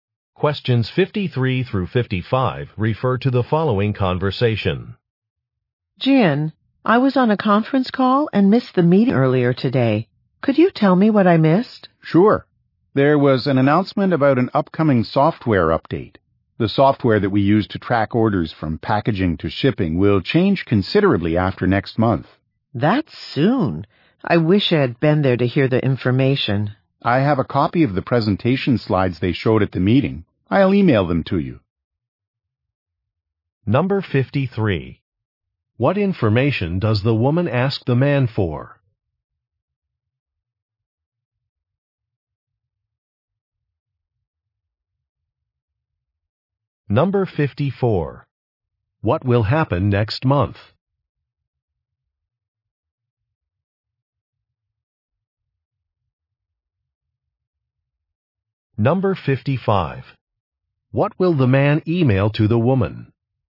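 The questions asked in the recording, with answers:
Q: What information does the woman ask the man for?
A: What she missed at the meeting

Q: What will happen next month?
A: The order-tracking software will be updated

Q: What will the man email to the woman?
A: The presentation slides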